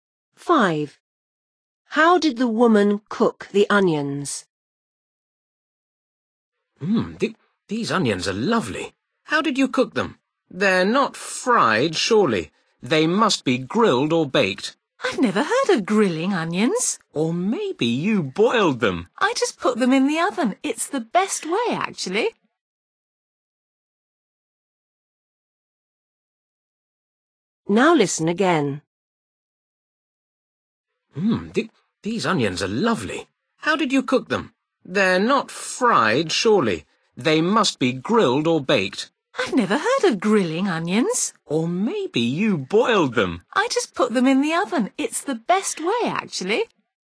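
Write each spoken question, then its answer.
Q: How did the woman cook the onions?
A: She baked them in the oven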